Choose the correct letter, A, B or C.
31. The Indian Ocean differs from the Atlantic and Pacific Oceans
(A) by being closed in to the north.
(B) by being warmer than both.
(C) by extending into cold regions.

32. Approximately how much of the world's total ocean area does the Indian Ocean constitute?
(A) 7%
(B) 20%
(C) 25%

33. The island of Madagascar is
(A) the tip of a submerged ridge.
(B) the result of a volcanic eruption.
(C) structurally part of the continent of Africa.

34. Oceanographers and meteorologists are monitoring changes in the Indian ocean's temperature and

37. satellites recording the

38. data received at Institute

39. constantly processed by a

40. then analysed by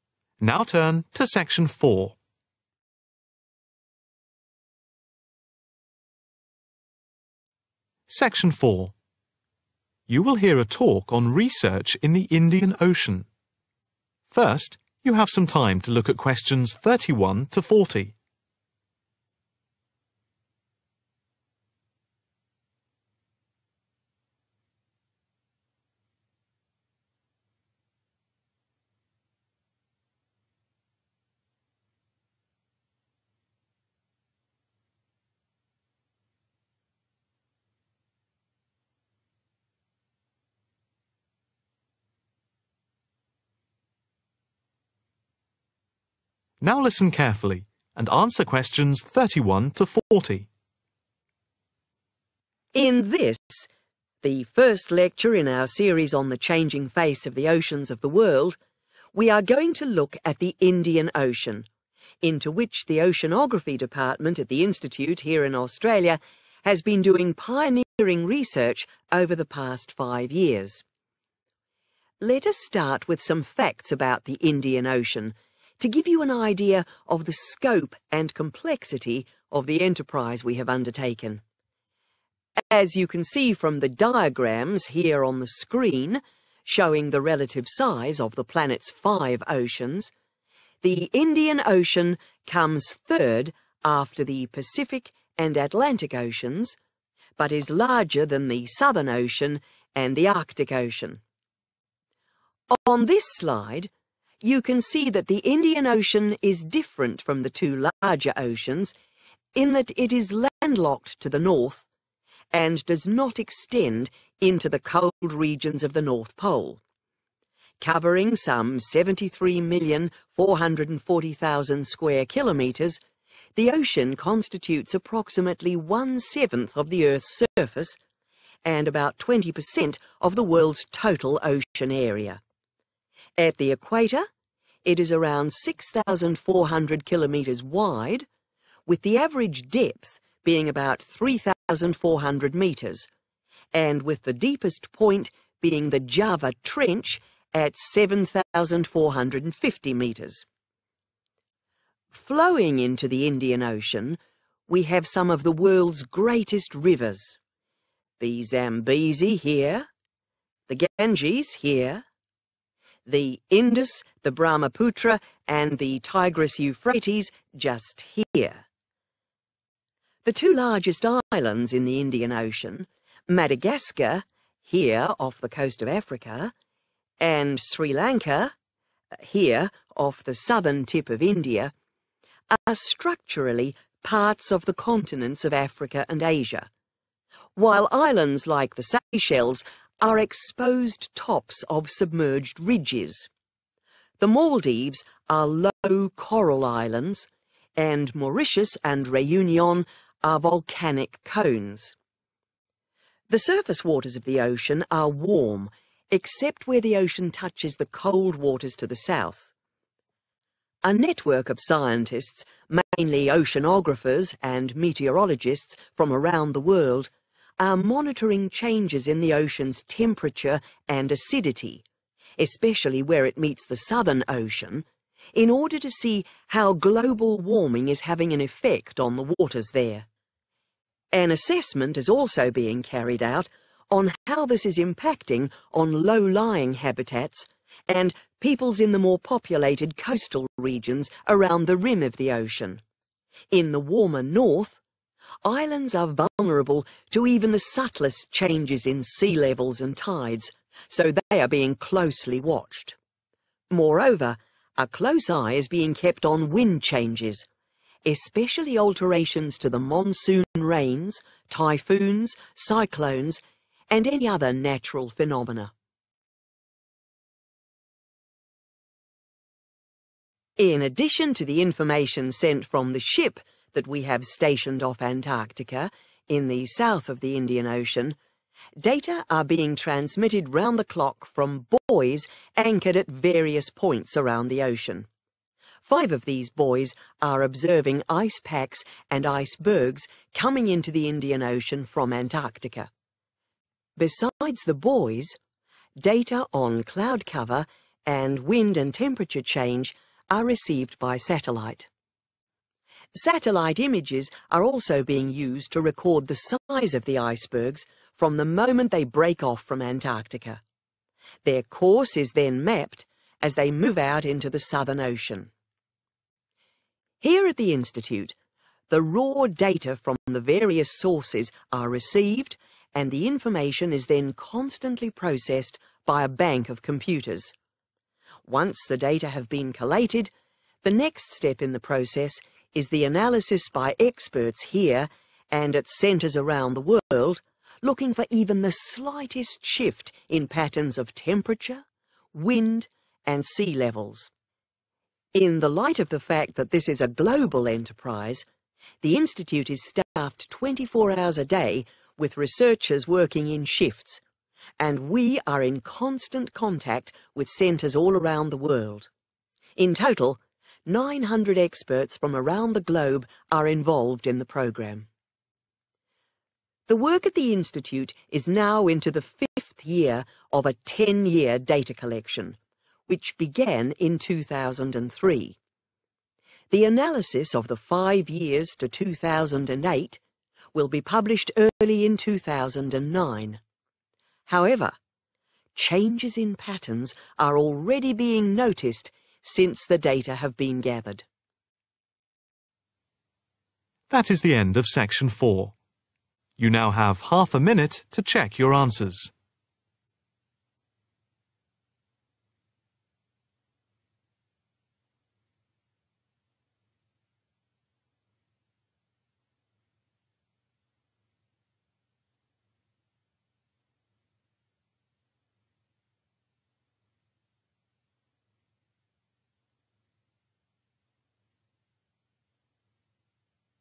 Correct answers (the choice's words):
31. by being closed in to the north.
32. 20%
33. structurally part of the continent of Africa.
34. acidity
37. size
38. raw
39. bank
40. experts/centres